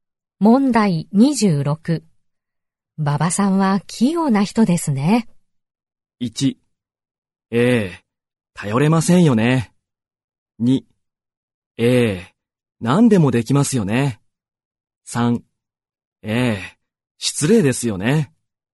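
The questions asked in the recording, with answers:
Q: 馬場さんは器用な人ですね。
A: 2: ええ、何でもできますよね。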